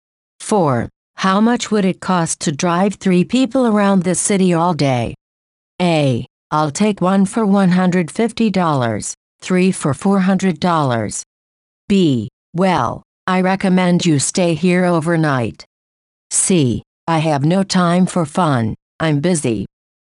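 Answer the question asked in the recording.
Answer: A: I'll take one for $150, 3 for $400.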